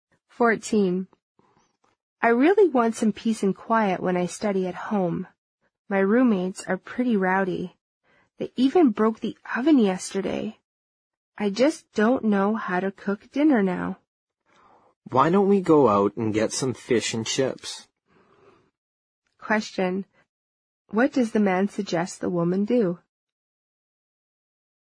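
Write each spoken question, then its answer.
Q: What does the man suggest the woman do?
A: Go out and get some fish and chips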